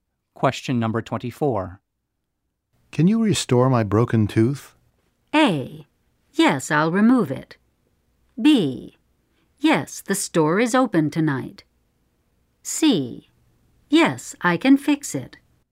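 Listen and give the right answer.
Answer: C: Yes, I can fix it.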